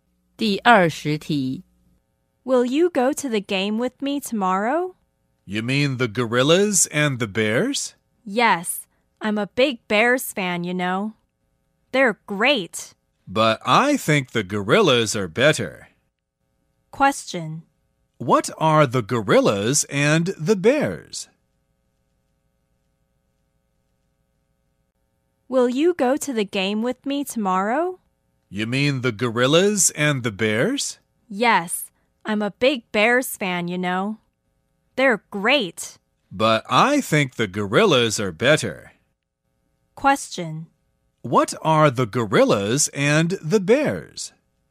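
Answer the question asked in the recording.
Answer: Sports teams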